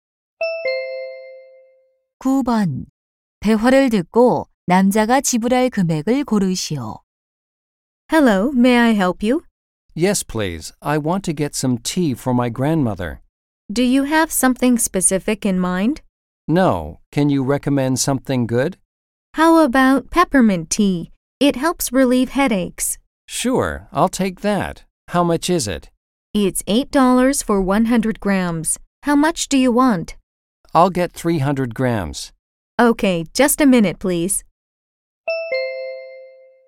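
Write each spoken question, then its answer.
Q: 대화를 듣고 남자가 지불할 금액을 고르시오.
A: 24달러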